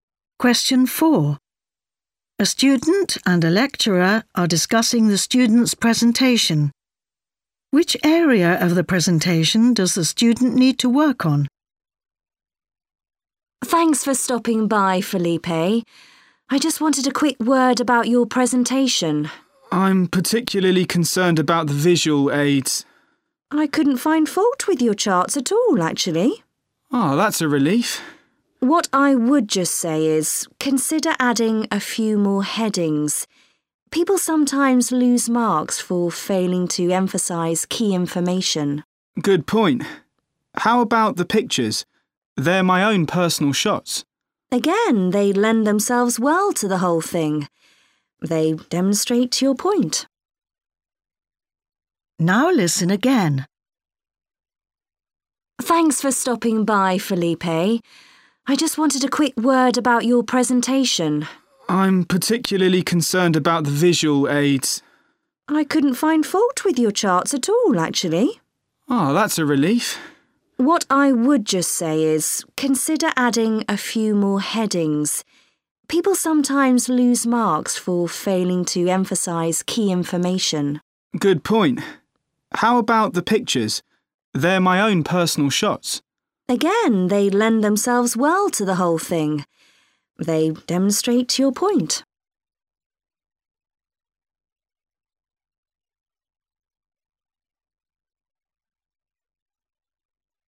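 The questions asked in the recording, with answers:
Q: Which area of the presentation does the student need to work on?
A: Adding more headings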